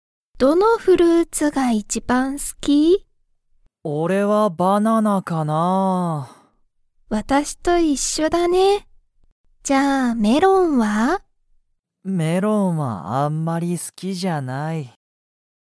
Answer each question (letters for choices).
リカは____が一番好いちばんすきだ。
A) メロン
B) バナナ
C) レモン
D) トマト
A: B

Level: Level 1